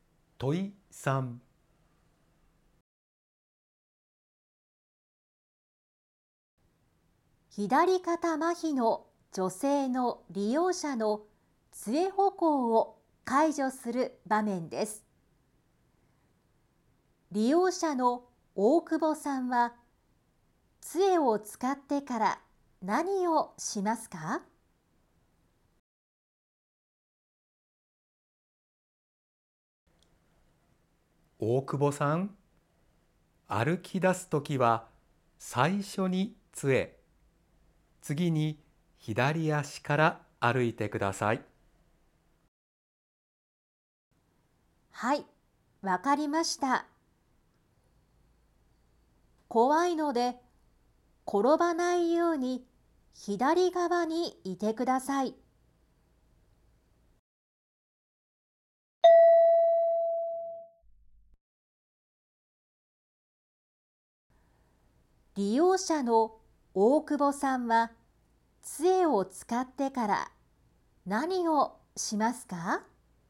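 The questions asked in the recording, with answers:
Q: 利用者の大久保さんは、杖を使ってから何をしますか?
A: 左足から歩き出す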